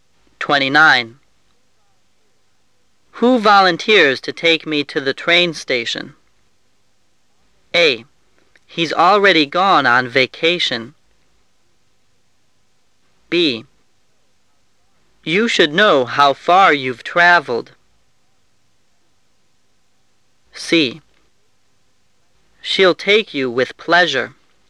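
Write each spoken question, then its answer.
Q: Who volunteers to take me to the train station?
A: C: She'll take you with pleasure.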